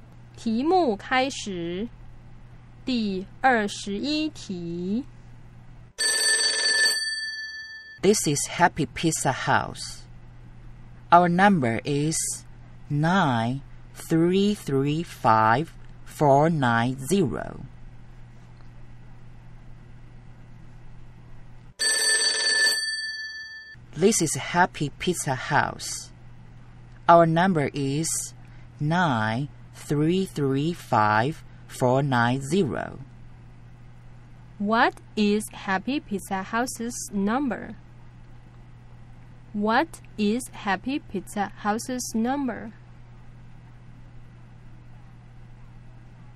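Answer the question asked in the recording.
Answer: 93354900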